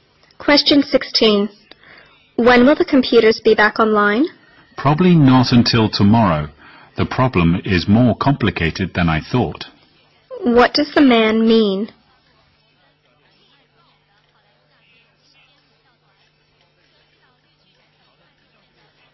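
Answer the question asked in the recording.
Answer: The computers won't be fixed until tomorrow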